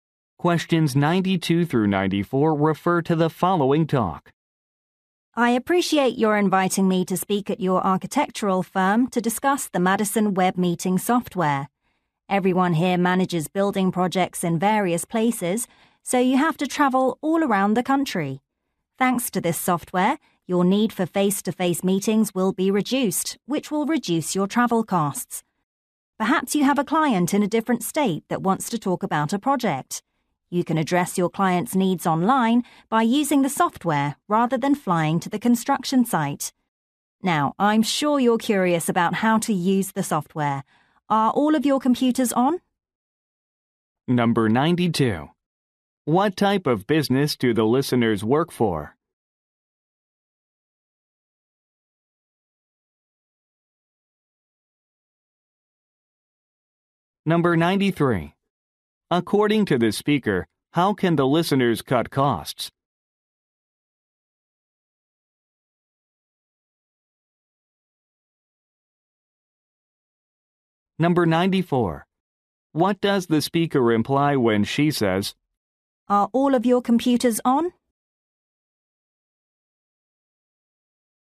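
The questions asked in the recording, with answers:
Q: What type of business do the listeners work for?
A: An architectural firm

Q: According to the speaker, how can the listeners cut costs?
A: By holding meetings online with the software instead of traveling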